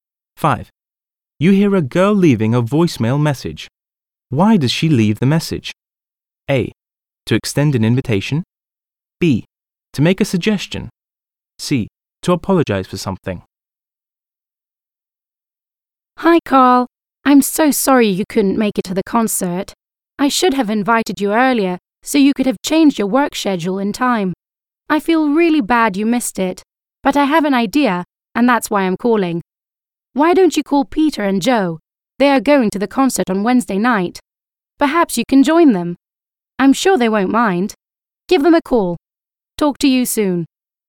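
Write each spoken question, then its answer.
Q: Why does she leave the message?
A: B: To make a suggestion.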